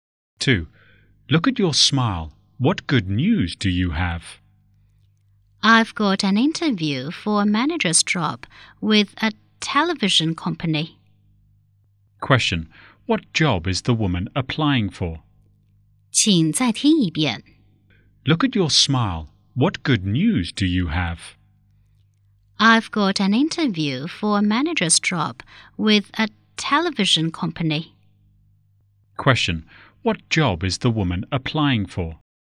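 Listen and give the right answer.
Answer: A manager's job with a television company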